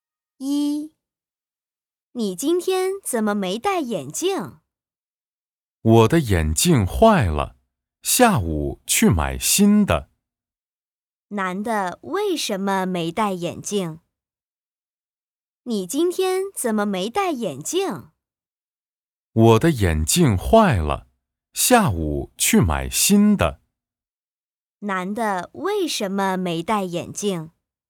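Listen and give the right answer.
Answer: 眼镜坏了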